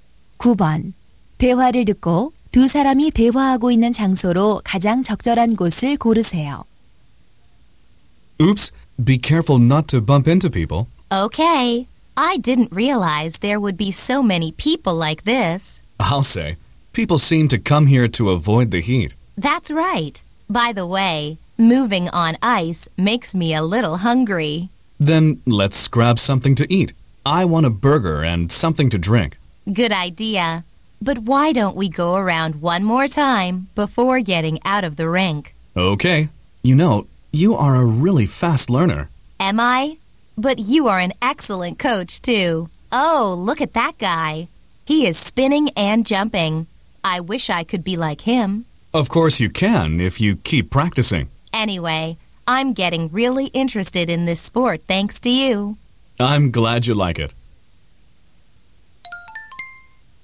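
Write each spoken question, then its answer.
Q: 대화를 듣고 두 사람이 대화하고 있는 장소로 가장 적절한 곳을 고르세요.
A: 아이스 스케이트장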